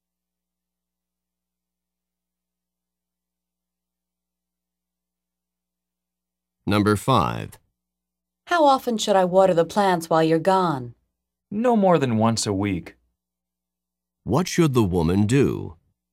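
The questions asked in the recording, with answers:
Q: What should the woman do?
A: Water the plants once a week at most.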